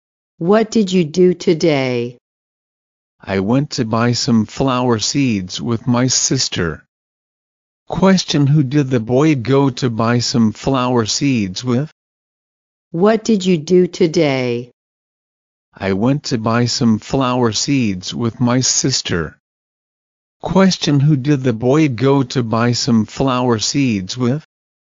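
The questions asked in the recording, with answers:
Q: Question, who did the boy go to buy some flower seeds with?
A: His sister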